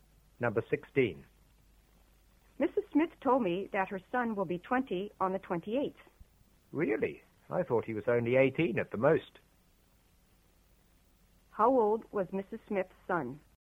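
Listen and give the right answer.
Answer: 19 (he will be 20 on the 28th)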